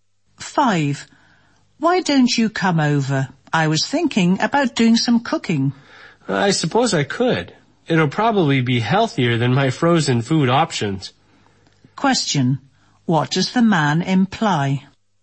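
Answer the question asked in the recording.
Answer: He will come over for a home-cooked meal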